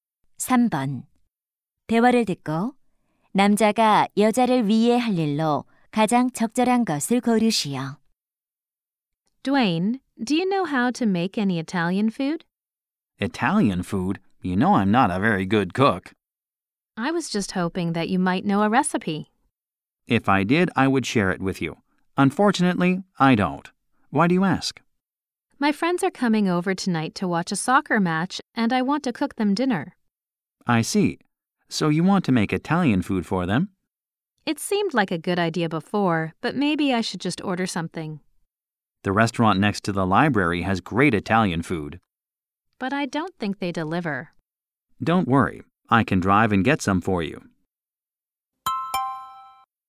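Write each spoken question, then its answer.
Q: 남자가 여자를 위해 할 일로 가장 적절한 것을 고르시오.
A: 이탈리아 음식 사 오기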